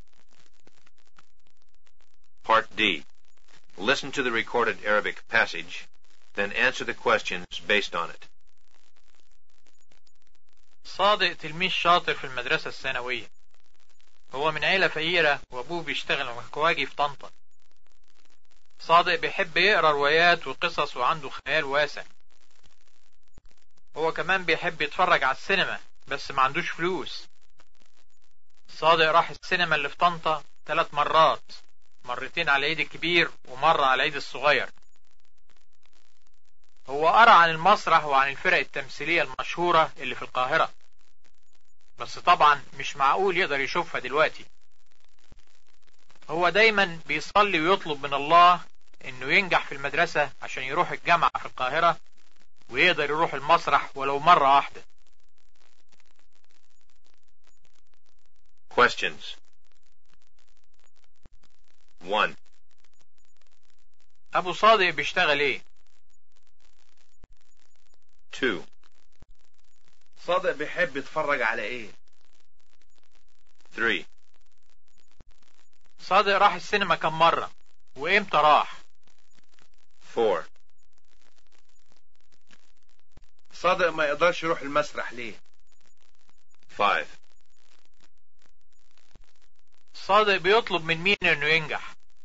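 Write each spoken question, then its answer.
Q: ابو صادق بيشتغل ايه؟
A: مكواجي في طنطا

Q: صادق بيحب يتفرج على ايه؟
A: السينما

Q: صادق راح السينما كم مرة وامتى راح؟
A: 3 مرات: مرتين في العيد الكبير ومرة في العيد الصغير

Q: صادق ما يقدرش يروح المسرح ليه؟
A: لأنه فقير والمسرح في القاهرة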